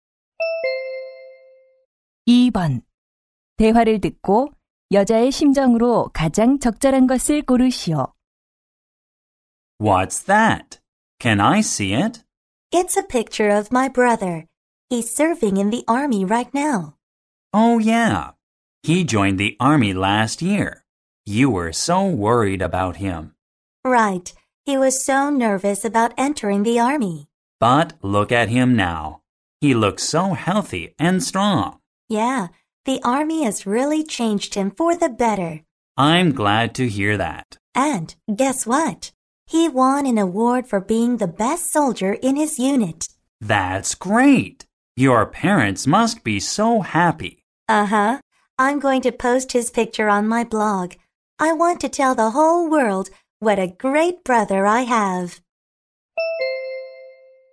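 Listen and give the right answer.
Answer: 자랑스러움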